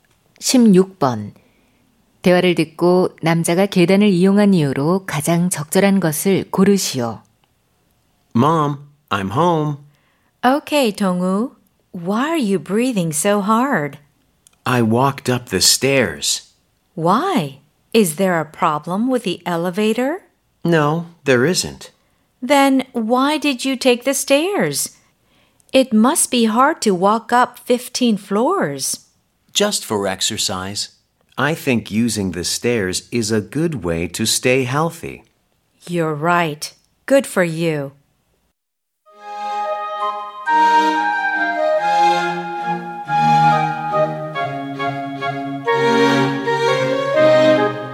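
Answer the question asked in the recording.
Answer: 운동(건강 유지)을 위해서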